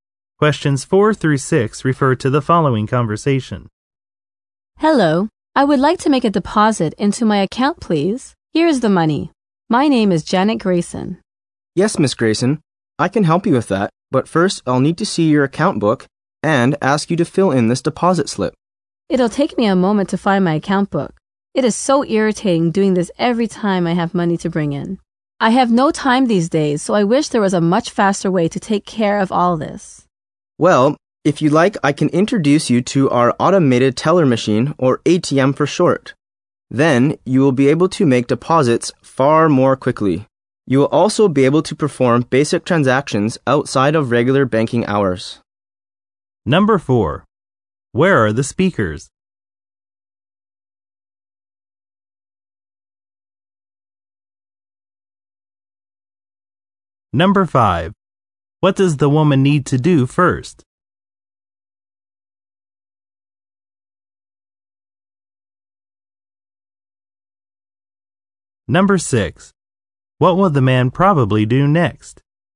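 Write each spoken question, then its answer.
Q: Where are the speakers?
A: At a bank

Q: What does the woman need to do first?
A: Show her account book and fill in a deposit slip

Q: What will the man probably do next?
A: Introduce her to the ATM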